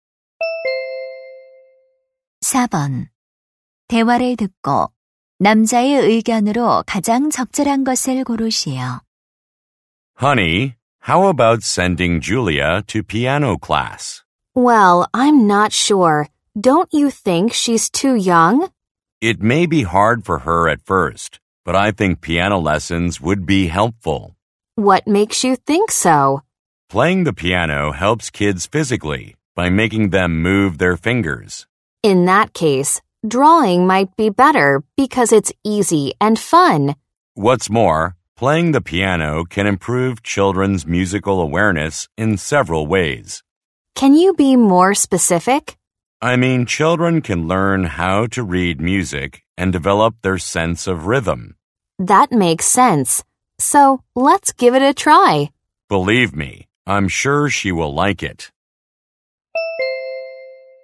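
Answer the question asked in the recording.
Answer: 피아노 레슨은 아이들에게 도움이 된다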